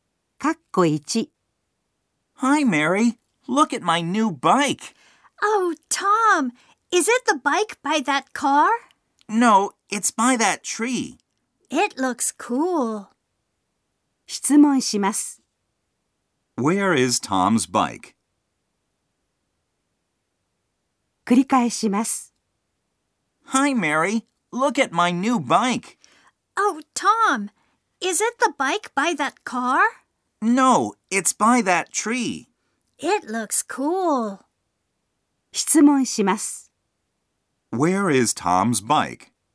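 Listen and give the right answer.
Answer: By that tree.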